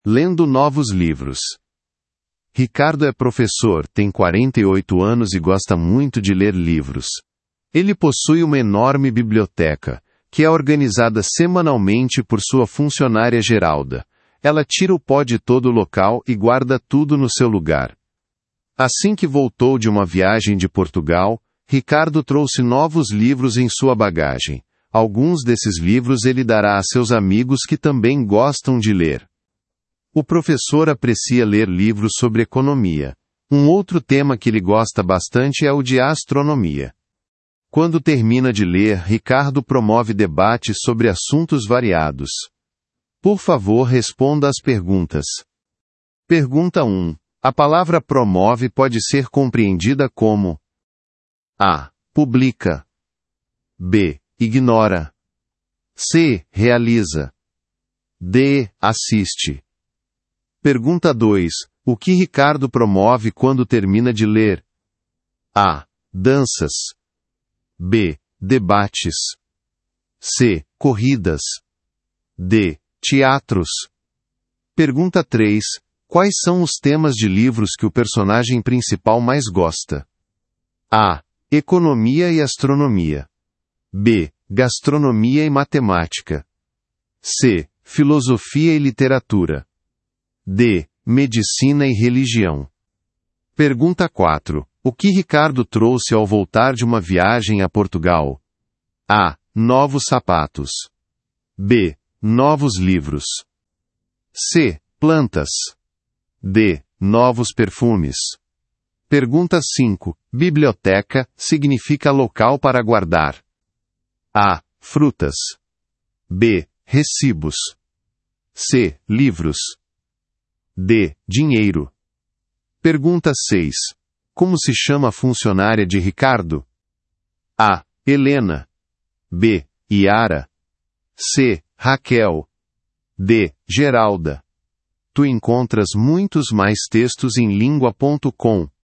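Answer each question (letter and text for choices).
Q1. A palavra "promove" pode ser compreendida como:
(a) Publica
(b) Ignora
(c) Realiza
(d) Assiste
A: (c) Realiza

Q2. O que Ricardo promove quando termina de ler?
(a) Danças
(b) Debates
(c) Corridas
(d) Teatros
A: (b) Debates

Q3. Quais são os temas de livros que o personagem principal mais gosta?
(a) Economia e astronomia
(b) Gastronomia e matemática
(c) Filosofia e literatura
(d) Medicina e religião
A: (a) Economia e astronomia

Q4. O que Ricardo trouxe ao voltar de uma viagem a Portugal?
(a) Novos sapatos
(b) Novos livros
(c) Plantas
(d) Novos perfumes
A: (b) Novos livros

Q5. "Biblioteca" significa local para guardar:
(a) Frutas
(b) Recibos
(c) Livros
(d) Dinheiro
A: (c) Livros

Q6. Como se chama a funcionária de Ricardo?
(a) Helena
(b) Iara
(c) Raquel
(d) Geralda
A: (d) Geralda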